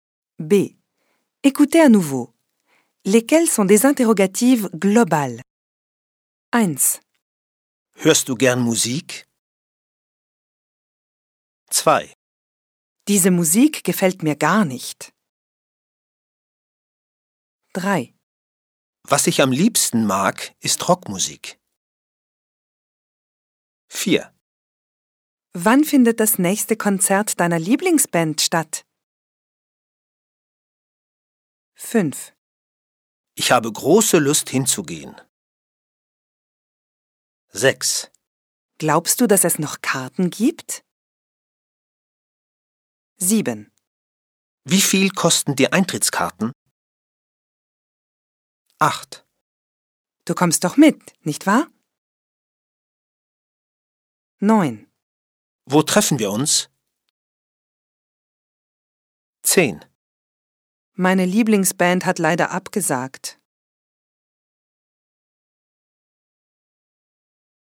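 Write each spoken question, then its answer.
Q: Lesquelles sont des interrogatives globales?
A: 1, 6, 8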